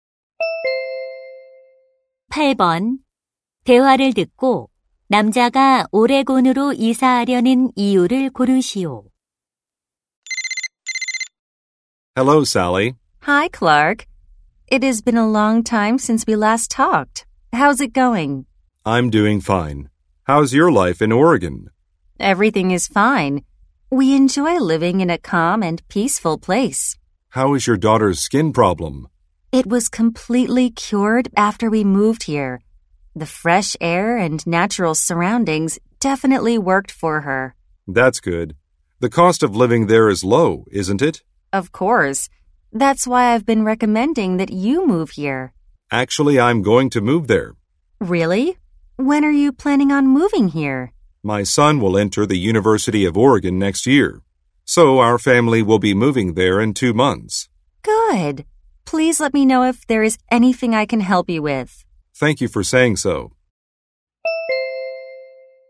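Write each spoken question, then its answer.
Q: 대화를 듣고 남자가 오레곤으로 이사하려는 이유를 고르시오.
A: 아들이 오레곤 대학교에 입학해서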